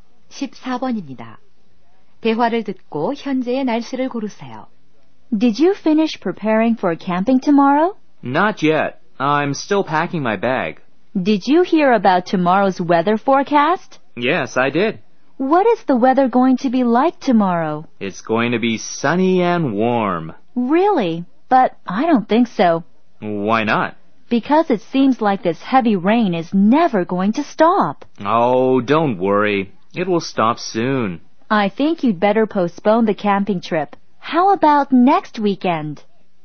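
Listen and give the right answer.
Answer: 비가 많이 옴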